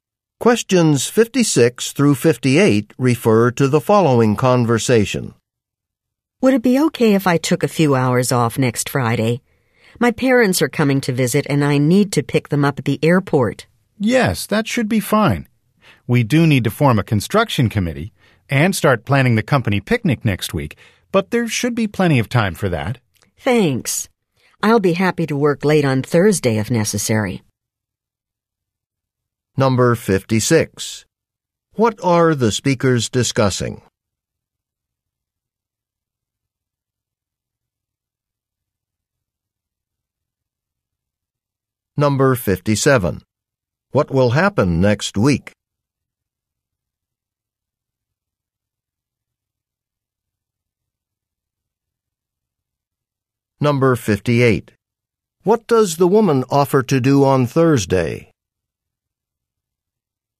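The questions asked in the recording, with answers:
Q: What are the speakers discussing?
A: Taking time off next Friday

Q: What will happen next week?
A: They will form a committee to plan the company picnic

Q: What does the woman offer to do on Thursday?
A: Work late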